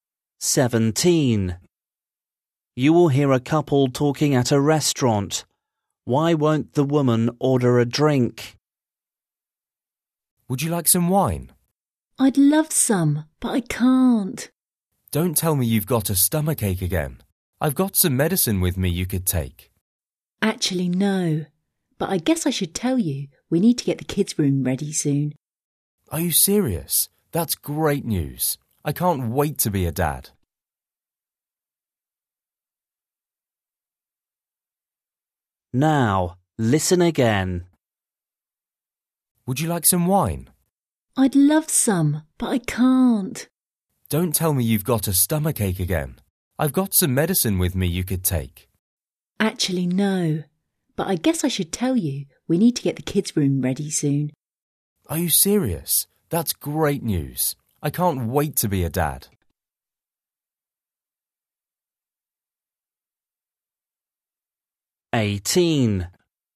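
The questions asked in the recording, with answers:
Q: Why won't the woman order a drink?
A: she is pregnant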